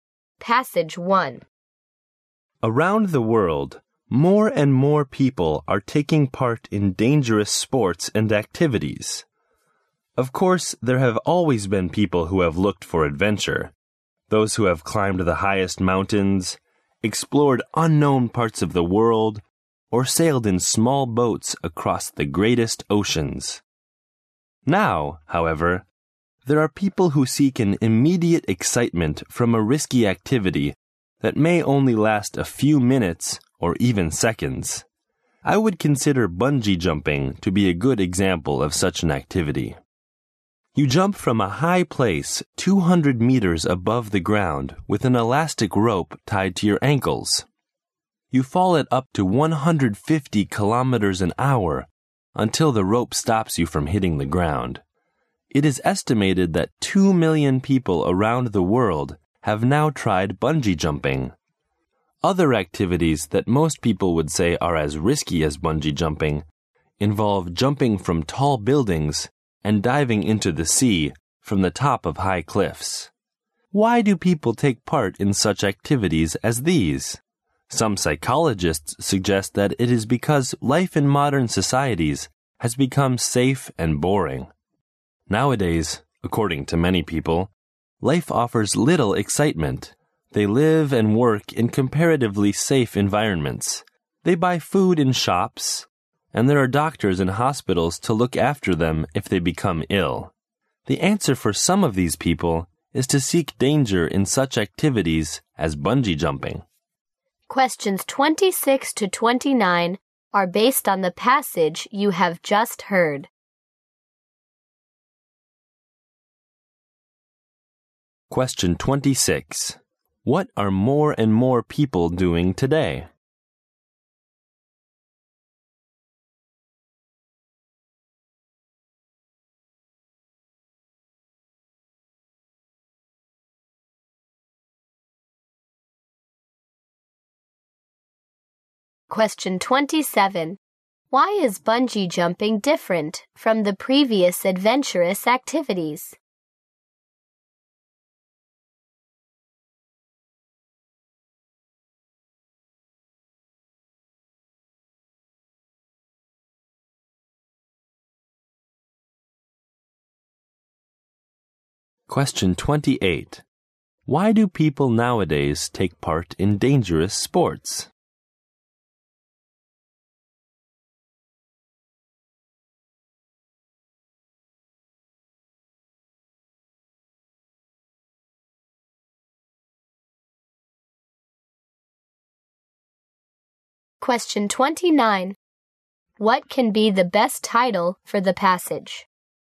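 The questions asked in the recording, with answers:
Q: What are more and more people doing today?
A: Taking part in dangerous sports and activities

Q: Why is bungee jumping different from the previous adventurous activities?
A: It gives immediate excitement lasting only seconds or minutes

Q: Why do people nowadays take part in dangerous sports?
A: Modern life has become safe and boring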